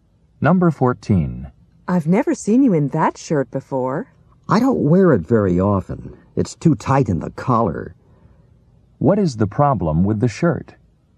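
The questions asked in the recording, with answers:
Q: What is the problem with the shirt?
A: It's too tight in the collar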